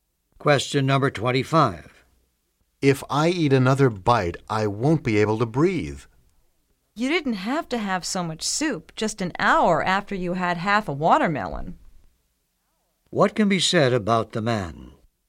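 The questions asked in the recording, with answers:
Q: What can be said about the man?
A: He ate too much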